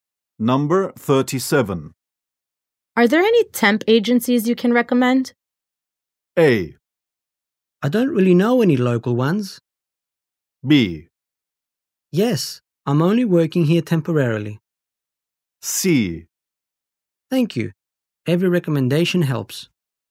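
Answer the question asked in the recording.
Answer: A: I don't really know any local ones.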